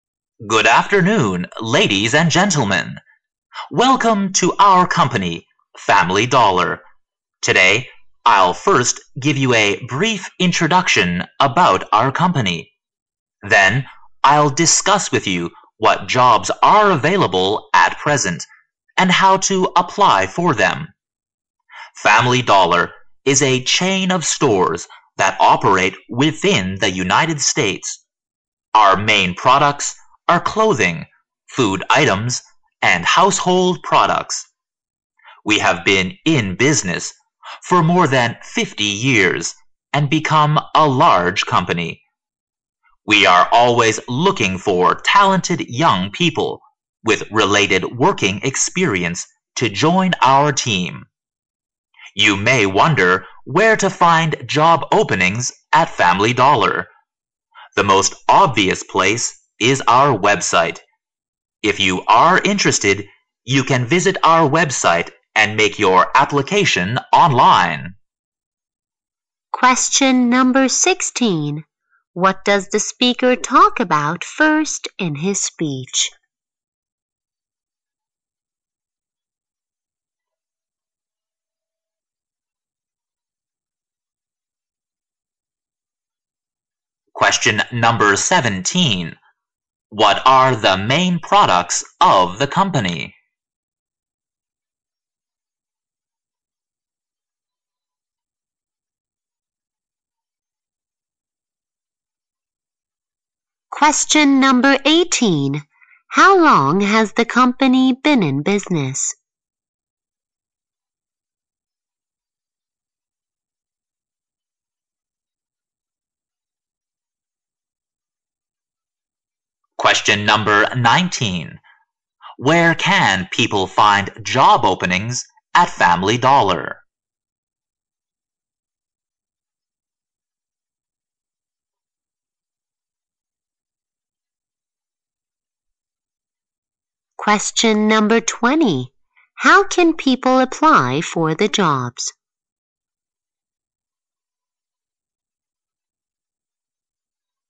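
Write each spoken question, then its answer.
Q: Question number 16. What does the speaker talk about first in his speech?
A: A brief introduction about the company

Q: Question number 17. What are the main products of the company?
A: Clothing, food items, and household products

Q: Question number 18. How long has the company been in business?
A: More than 50 years

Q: Question number 19. Where can people find job openings at Family Dollar?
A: On the company's website

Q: Question number 20. How can people apply for the jobs?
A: Online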